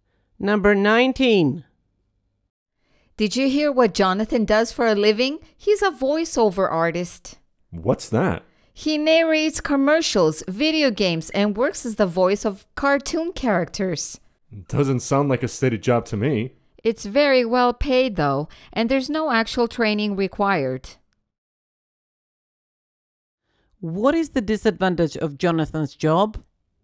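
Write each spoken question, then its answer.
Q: What is the disadvantage of Jonathan's job?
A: It is not a steady job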